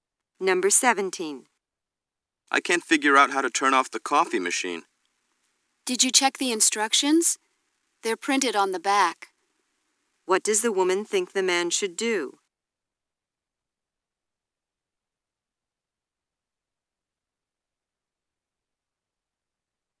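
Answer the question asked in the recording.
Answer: Read the instructions on the back of the machine.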